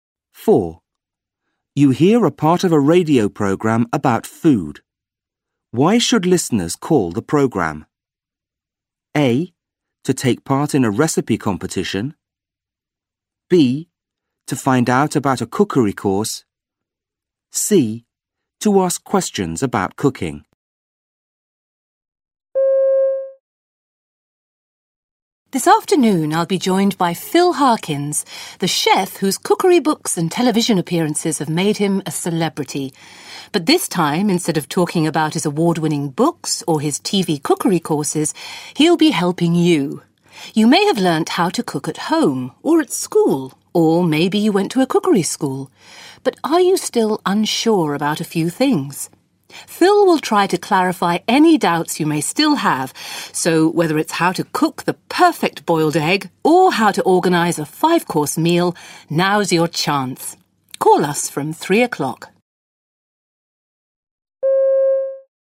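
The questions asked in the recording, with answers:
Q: Why should listeners call the programme?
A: C: To ask questions about cooking.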